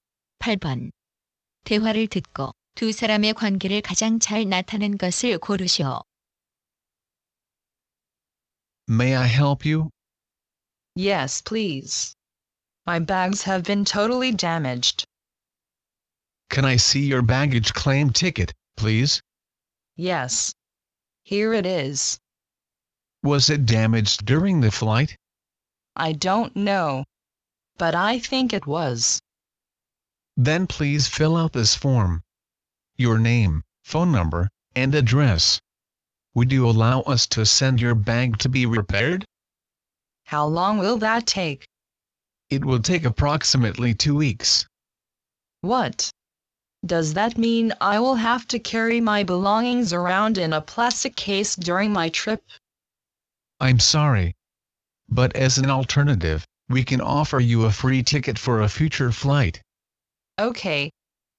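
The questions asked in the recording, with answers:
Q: 대화를 듣고 두 사람의 관계를 가장 잘 나타낸 것을 고르시오.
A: 항공사 직원 - 승객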